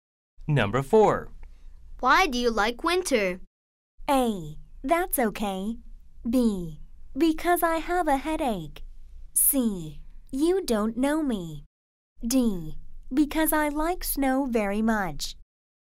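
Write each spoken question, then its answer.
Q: Why do you like winter?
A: D: Because I like snow very much.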